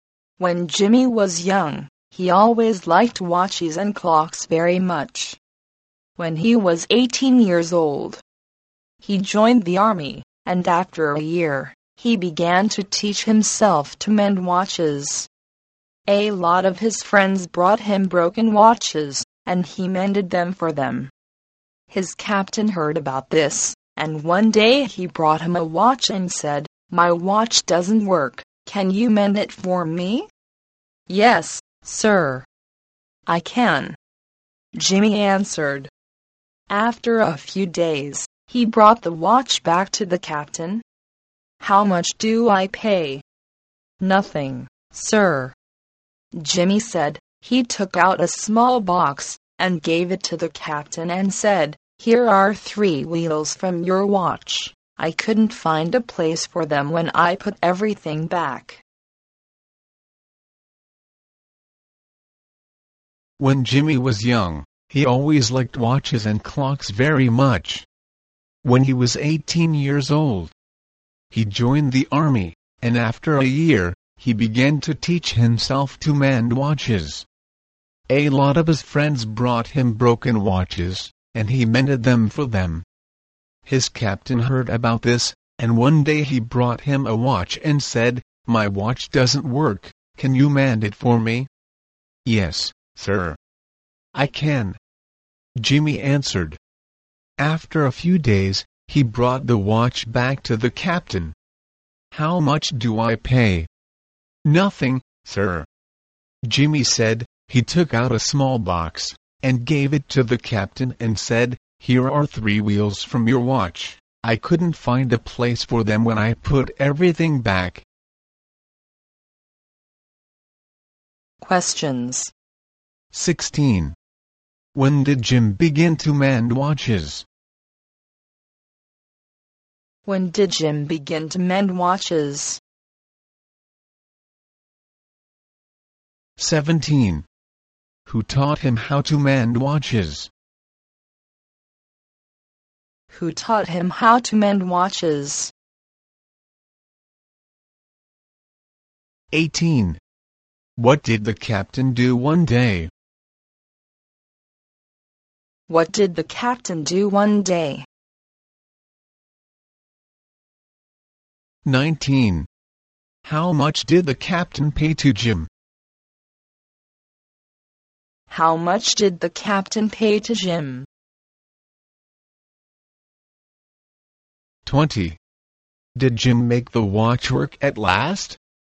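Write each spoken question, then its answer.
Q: When did Jim begin to mend watches?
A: When he was 19, a year after joining the army

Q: Who taught him how to mend watches?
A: He taught himself

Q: What did the captain do one day?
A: He brought Jimmy his watch to mend

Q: How much did the captain pay to Jim?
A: Nothing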